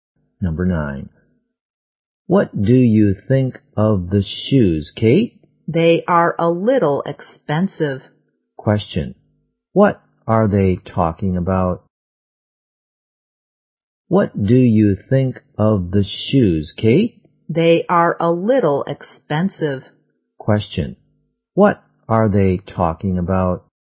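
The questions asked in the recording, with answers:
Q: What are they talking about?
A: The shoes.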